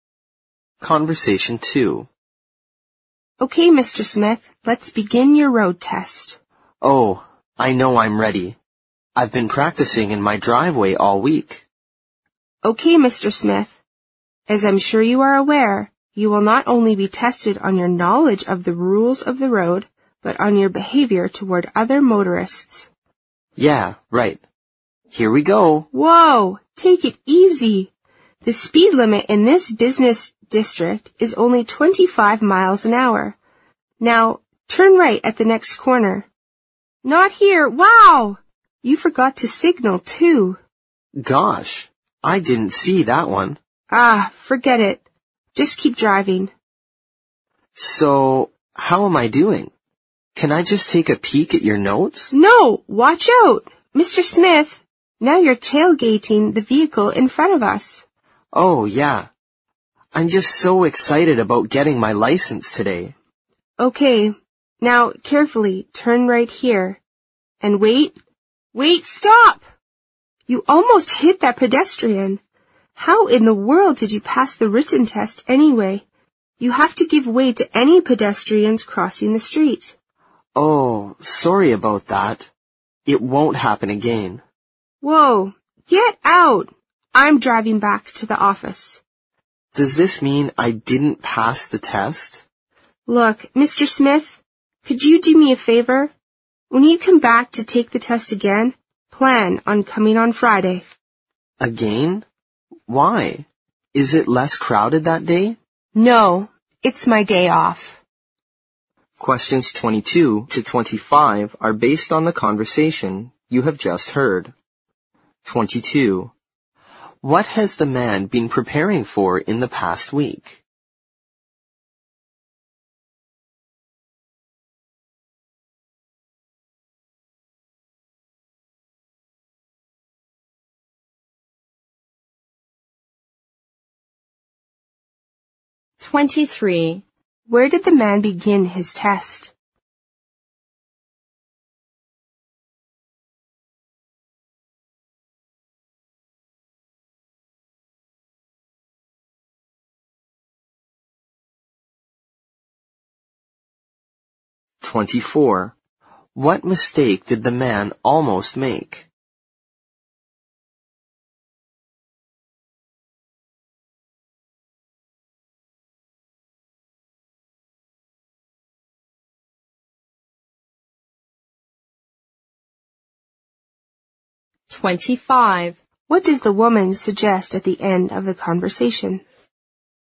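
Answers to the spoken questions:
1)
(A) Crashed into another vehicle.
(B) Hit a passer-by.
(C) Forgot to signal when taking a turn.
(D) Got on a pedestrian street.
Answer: (B) Hit a passer-by.
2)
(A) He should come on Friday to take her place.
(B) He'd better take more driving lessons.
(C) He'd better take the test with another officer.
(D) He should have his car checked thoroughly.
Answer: (C) He'd better take the test with another officer.
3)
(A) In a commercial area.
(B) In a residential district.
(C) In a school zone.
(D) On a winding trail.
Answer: (A) In a commercial area.
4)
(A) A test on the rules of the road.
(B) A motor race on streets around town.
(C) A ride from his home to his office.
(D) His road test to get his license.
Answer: (D) His road test to get his license.

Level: 四级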